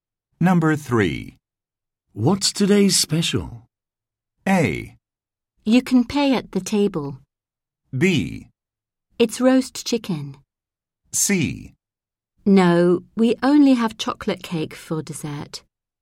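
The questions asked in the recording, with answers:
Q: What's today's special?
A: B: It's roast chicken.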